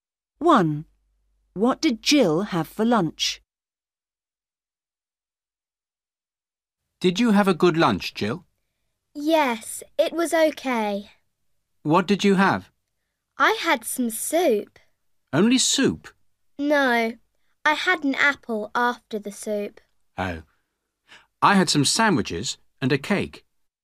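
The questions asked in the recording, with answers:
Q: What did Jill have for lunch?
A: soup and an apple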